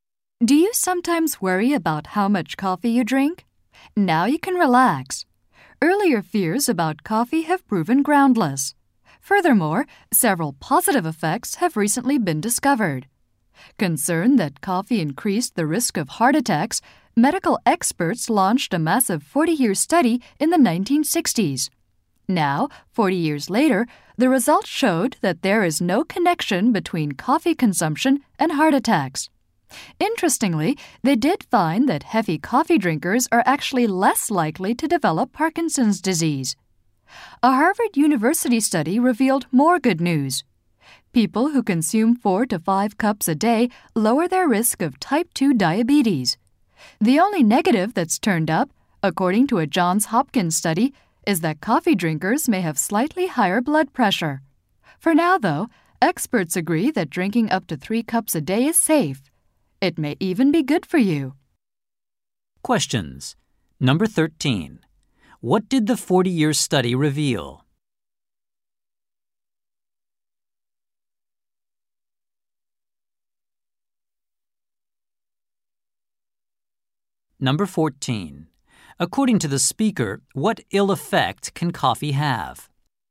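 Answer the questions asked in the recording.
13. No connection between coffee and heart attacks
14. Slightly higher blood pressure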